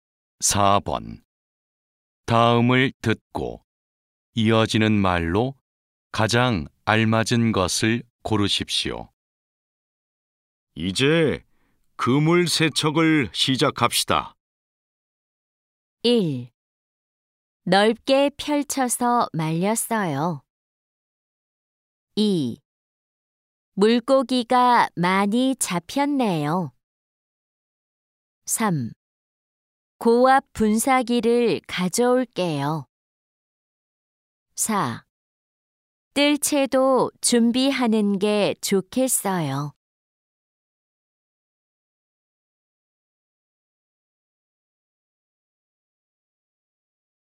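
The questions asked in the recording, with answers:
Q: 다음을 듣고 이어지는 말로 가장 알맞은 것을 고르십시오.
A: 3: 고압 분사기를 가져올게요.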